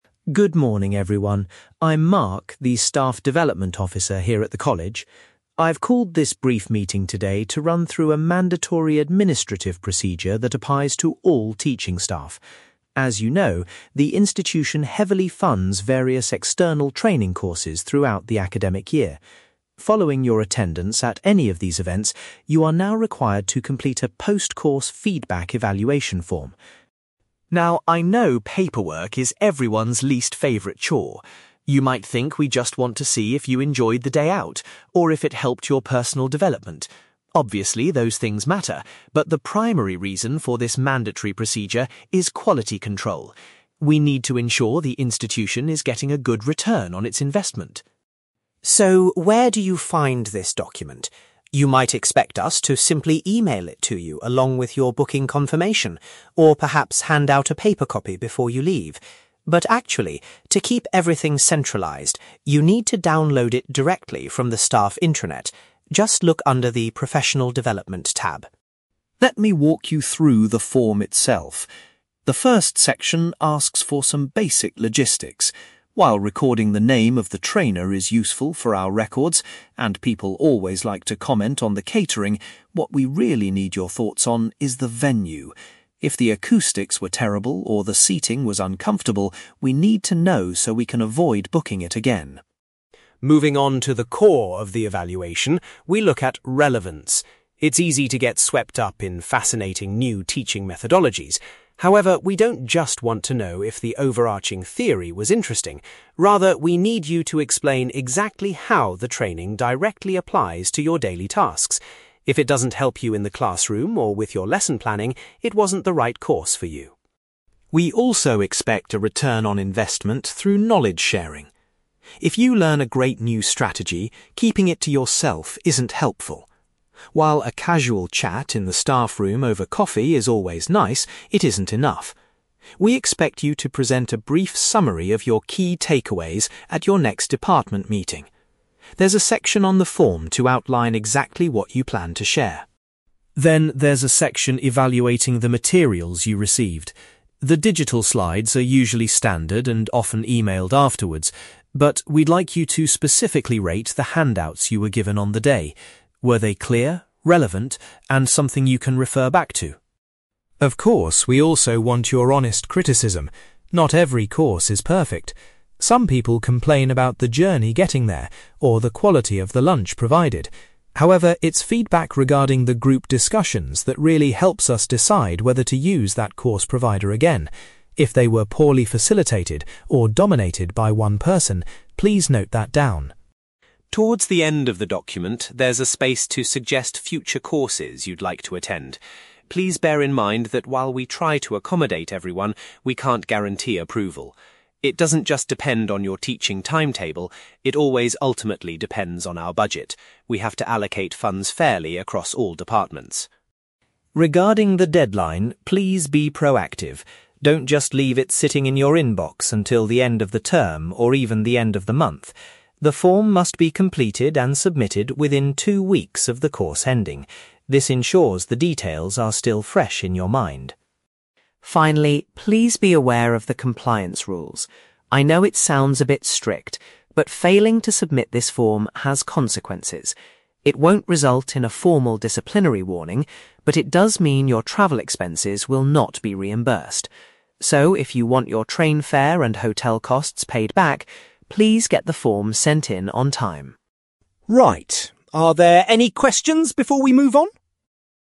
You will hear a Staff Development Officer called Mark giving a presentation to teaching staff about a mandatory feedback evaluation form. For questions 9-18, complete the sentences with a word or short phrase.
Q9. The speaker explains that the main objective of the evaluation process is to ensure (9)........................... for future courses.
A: quality control

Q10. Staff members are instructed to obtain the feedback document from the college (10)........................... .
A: intranet

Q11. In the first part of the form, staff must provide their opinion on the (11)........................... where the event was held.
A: venue

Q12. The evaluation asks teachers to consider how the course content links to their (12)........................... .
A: daily tasks

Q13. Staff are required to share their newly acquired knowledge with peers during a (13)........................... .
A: department meeting

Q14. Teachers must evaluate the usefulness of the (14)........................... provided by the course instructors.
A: handouts

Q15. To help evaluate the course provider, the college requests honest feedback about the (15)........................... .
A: group discussions

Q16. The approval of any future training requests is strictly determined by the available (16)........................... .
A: budget

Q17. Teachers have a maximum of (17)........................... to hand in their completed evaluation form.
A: two weeks

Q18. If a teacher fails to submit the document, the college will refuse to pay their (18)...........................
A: travel expenses

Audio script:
Mark: Good morning, everyone. I'm Mark, the Staff Development Officer here at the college. I've called this brief meeting today to run through a mandatory administrative procedure that applies to all teaching staff. As you know, the institution heavily funds various external training courses throughout the academic year. Following your attendance at any of these events, you are now required to complete a post-course feedback evaluation form.
Now, I know paperwork is everyone's least favourite chore. You might think we just want to see if you enjoyed the day out, or if it helped your personal development. Obviously, those things matter, but the primary reason for this mandatory procedure is quality control. We need to ensure the institution is getting a good return on its investment.
So, where do you find this document? You might expect us to simply email it to you along with your booking confirmation, or perhaps hand out a paper copy before you leave. But actually, to keep everything centralised, you need to download it directly from the staff intranet. Just look under the 'Professional Development' tab.
Let me walk you through the form itself. The first section asks for some basic logistics. While recording the name of the trainer is useful for our records, and people always like to comment on the catering, what we really need your thoughts on is the venue. If the acoustics were terrible or the seating was uncomfortable, we need to know so we can avoid booking it again.
Moving on to the core of the evaluation, we look at relevance. It's easy to get swept up in fascinating new teaching methodologies. However, we don't just want to know if the overarching theory was interesting. Rather, we need you to explain exactly how the training directly applies to your daily tasks. If it doesn't help you in the classroom or with your lesson planning, it wasn't the right course for you.
We also expect a return on investment through knowledge sharing. If you learn a great new strategy, keeping it to yourself isn't helpful. While a casual chat in the staffroom over coffee is always nice, it isn't enough. We expect you to present a brief summary of your key takeaways at your next department meeting. There's a section on the form to outline exactly what you plan to share.
Then there's a section evaluating the materials you received. The digital slides are usually standard and often emailed afterwards, but we'd like you to specifically rate the handouts you were given on the day. Were they clear, relevant, and something you can refer back to?
Of course, we also want your honest criticism. Not every course is perfect. Some people complain about the journey getting there, or the quality of the lunch provided. However, it's feedback regarding the group discussions that really helps us decide whether to use that course provider again. If they were poorly facilitated or dominated by one person, please note that down.
Towards the end of the document, there's a space to suggest future courses you'd like to attend. Please bear in mind that while we try to accommodate everyone, we can't guarantee approval. It doesn't just depend on your teaching timetable; it always ultimately depends on our budget. We have to allocate funds fairly across all departments.
Regarding the deadline, please be proactive. Don't just leave it sitting in your inbox until the end of the term, or even the end of the month. The form must be completed and submitted within two weeks of the course ending. This ensures the details are still fresh in your mind.
Finally, please be aware of the compliance rules. I know it sounds a bit strict, but failing to submit this form has consequences. It won't result in a formal disciplinary warning, but it does mean your travel expenses will not be reimbursed. So, if you want your train fare and hotel costs paid back, please get the form sent in on time!
Right, are there any questions before we move on?

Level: B2